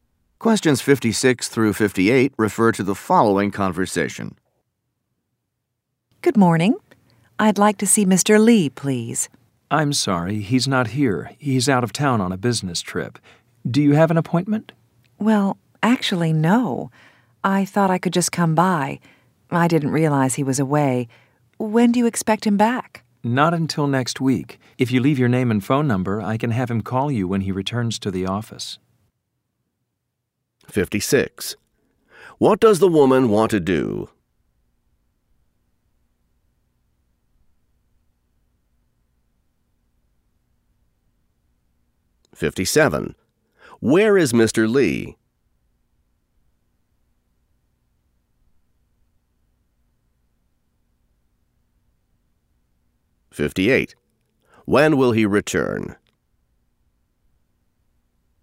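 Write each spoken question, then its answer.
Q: What does the woman want to do?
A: See Mr. Lee

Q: Where is Mr. Lee?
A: Out of town on a business trip

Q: When will he return?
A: Next week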